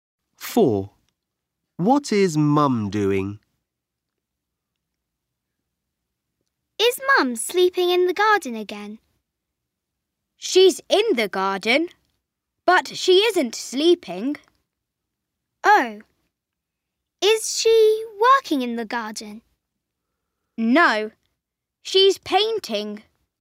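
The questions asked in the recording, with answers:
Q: What is Mum doing?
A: She's painting in the garden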